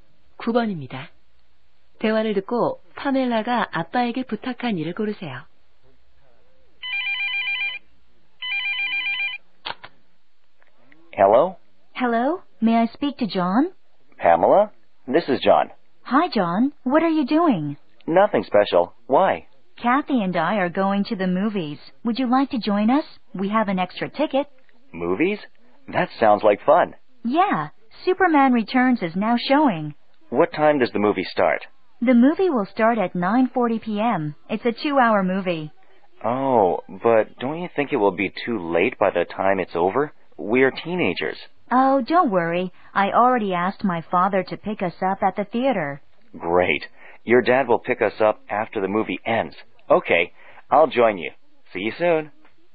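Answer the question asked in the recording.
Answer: 영화가 끝난 후 극장으로 데리러 오기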